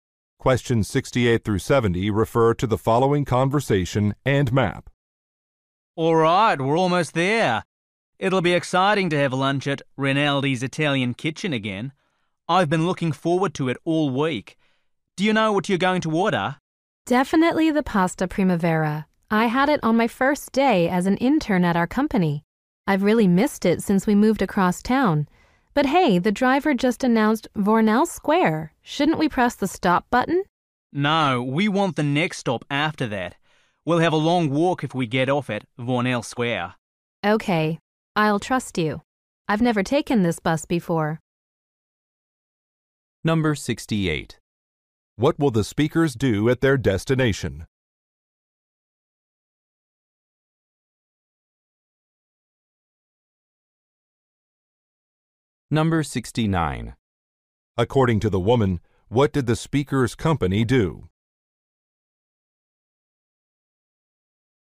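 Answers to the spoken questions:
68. Have lunch
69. Moved across town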